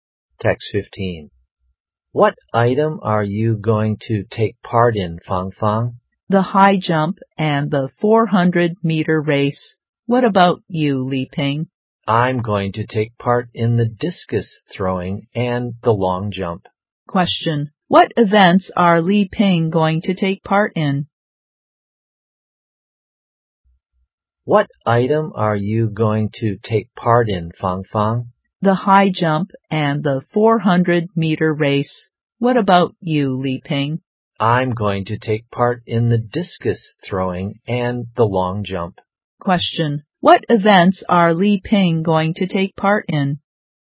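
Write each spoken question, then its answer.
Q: What events are Li Ping going to take part in?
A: The discus throwing and the long jump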